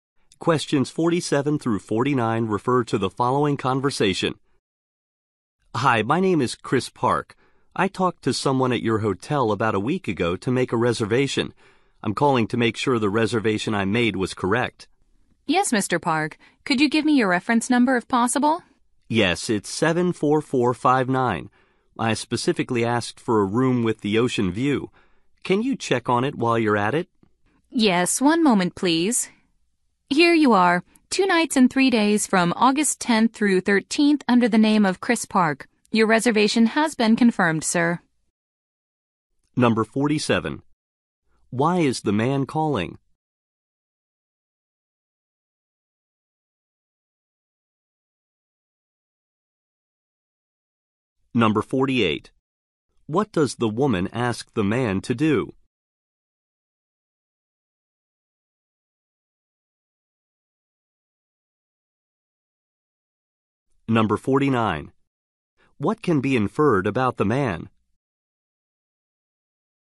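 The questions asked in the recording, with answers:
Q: Why is the man calling?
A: To confirm his hotel reservation

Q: What does the woman ask the man to do?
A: Give his reference number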